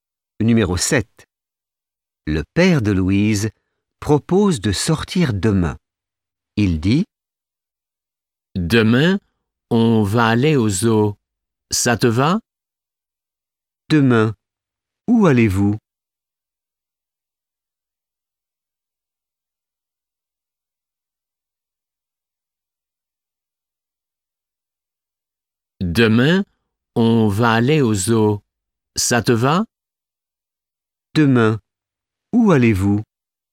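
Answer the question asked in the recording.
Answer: Au zoo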